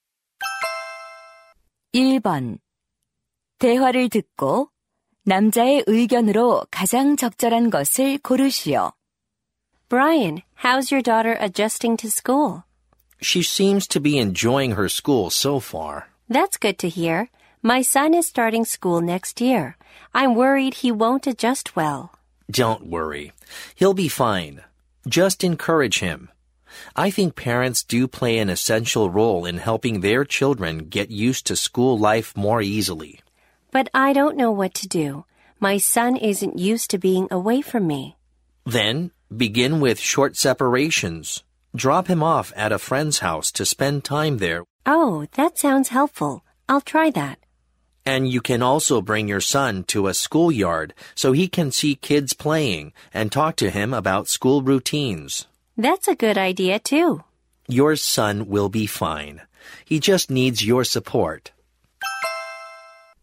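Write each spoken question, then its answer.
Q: 대화를 듣고 남자의 의견으로 가장 적절한 것을 고르시오.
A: 부모가 자녀의 학교 적응을 도와야 한다.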